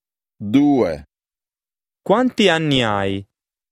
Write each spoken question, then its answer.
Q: Quanti anni hai?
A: Cinzia.